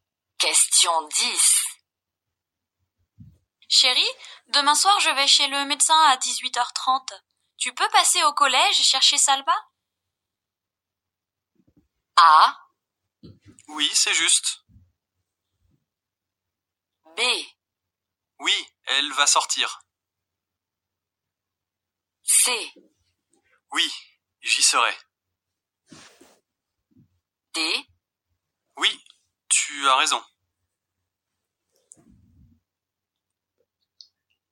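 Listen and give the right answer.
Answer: C: Oui, j'y serai.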